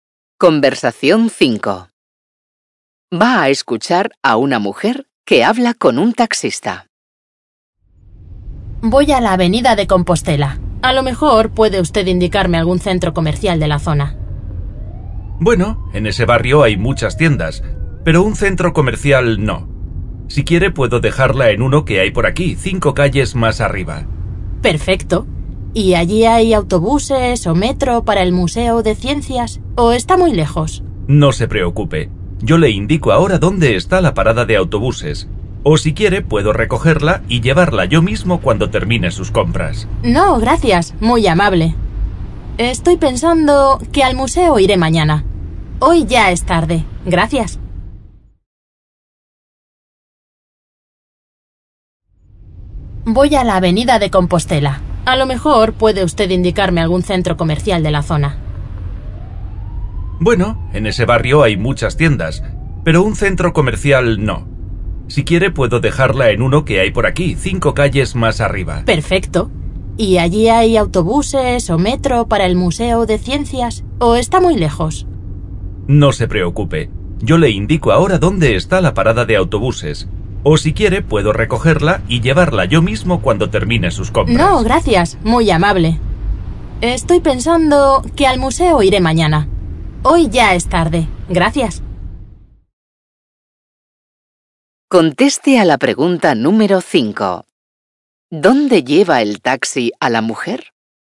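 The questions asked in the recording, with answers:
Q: ¿Dónde lleva el taxi a la mujer?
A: A un centro comercial cercano, 5 calles más arriba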